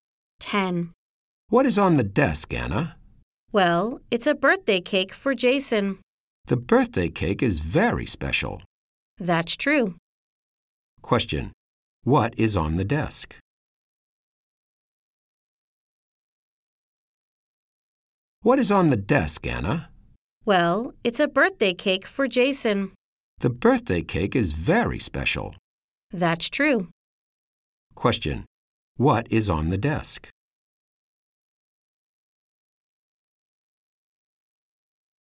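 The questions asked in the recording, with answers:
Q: What is on the desk?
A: A birthday cake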